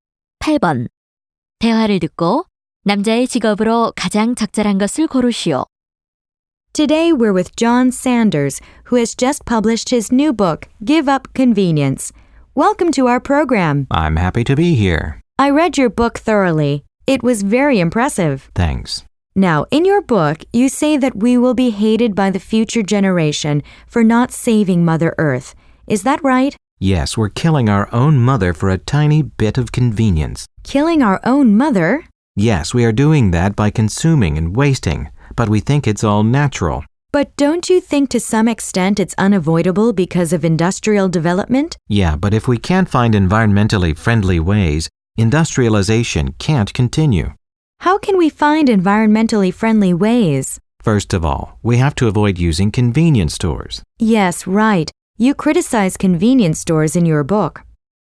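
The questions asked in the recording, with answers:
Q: 대화를 듣고 남자의 직업으로 가장 적절한 것을 고르시오.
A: 작가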